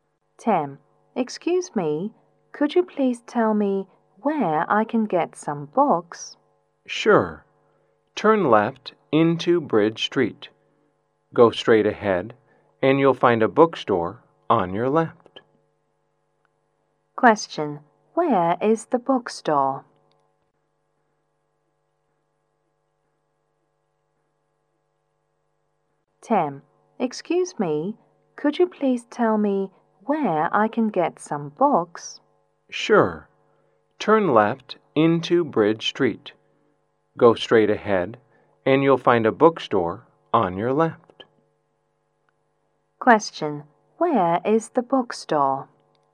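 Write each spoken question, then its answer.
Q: Where is the bookstore?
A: On the left side of Bridge Street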